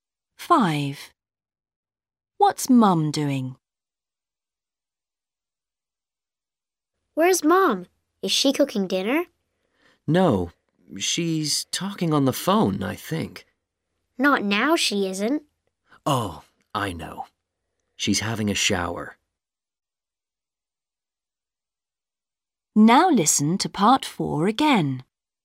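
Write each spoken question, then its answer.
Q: What's Mum doing?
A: having a shower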